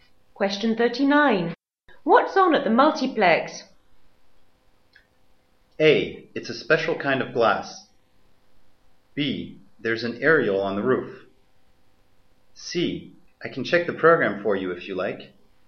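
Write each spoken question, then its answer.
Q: What's on at the multiplex?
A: C: I can check the program for you if you like.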